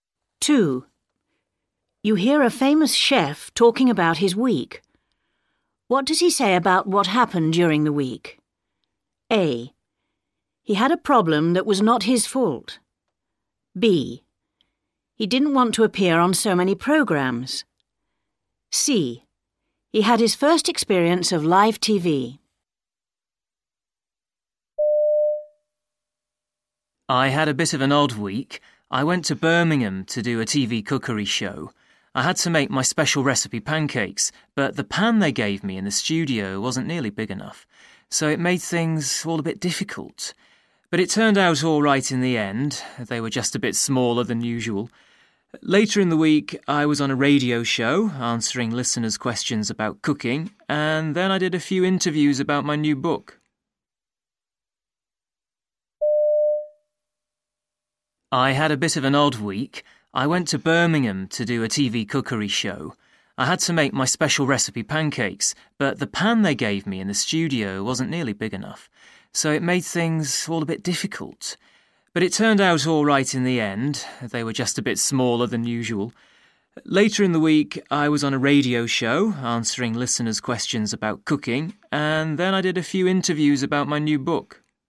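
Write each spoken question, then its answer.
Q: What does he say about what happened during the week?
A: A: He had a problem that was not his fault.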